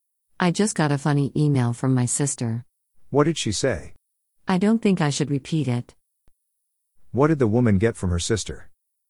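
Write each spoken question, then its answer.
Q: What did the woman get from her sister?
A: A funny email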